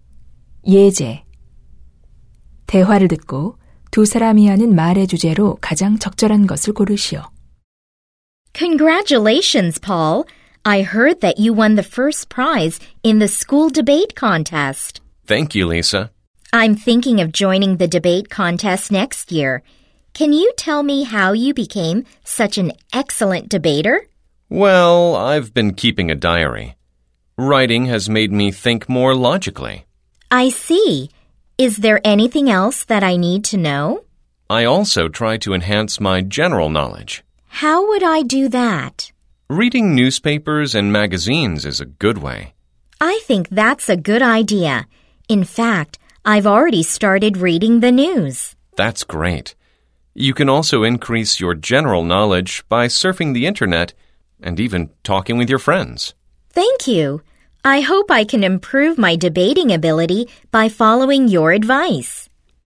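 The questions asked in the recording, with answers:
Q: 대화를 듣고 두 사람이 하는 말의 주제로 가장 적절한 것을 고르시오.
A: 토론을 잘하는 방법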